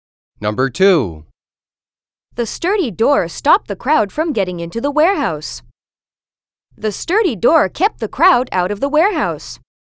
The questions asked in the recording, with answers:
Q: The sturdy door stopped the crowd from getting into the warehouse.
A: Same as the correct answer.